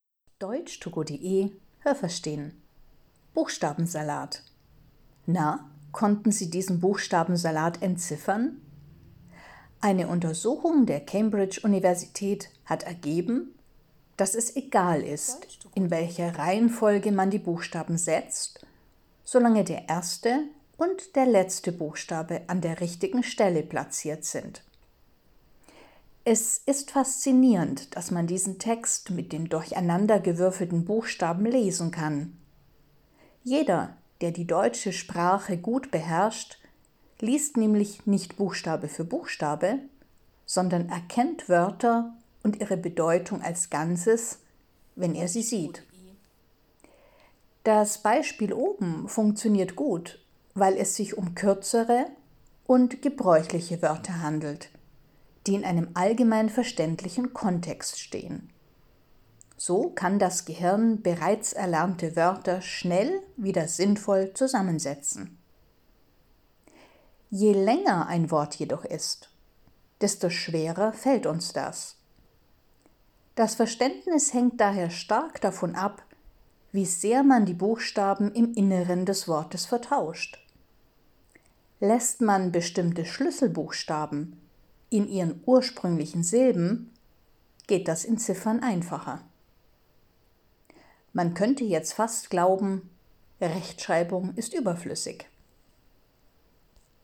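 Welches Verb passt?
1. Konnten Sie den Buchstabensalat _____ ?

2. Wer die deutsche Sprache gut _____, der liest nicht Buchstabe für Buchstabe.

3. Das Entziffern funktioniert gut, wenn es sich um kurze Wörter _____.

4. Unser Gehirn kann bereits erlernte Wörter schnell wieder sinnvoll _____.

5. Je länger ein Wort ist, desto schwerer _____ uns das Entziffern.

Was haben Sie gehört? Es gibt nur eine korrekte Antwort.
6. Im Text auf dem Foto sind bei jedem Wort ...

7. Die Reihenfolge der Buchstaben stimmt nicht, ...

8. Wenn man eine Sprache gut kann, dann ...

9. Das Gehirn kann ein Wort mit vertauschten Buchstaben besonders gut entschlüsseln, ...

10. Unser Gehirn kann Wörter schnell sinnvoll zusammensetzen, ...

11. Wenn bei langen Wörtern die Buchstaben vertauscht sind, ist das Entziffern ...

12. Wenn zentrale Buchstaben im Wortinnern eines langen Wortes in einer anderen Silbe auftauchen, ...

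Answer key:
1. entziffern
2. beherrscht
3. handelt
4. zusammensetzen
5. fällt
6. der erste und der letzte Buchstabe an der richtigen Stelle
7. trotzdem kann man den Text lesen
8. liest man nicht Buchstabe für Buchstabe, sondern erkennt Wörter als Ganzes
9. wenn es kurze, gebräuchliche Wörter in einem verständlichen Kontext sind
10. wenn es sie bereits erlernt hat
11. schwerer
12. ist das Entziffern schwieriger

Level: B (mittel)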